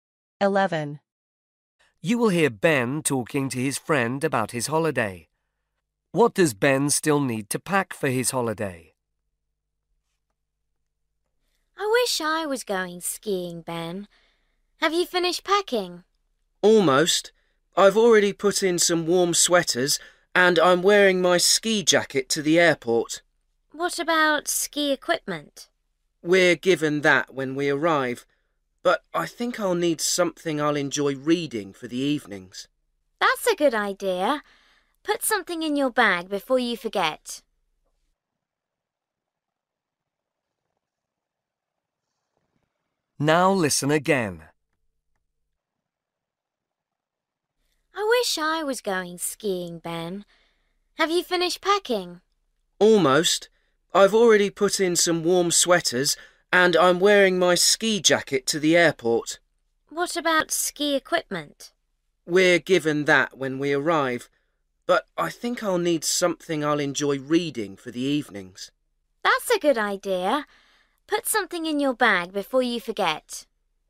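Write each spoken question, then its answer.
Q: What does Ben still need to pack for his holiday?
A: a book to read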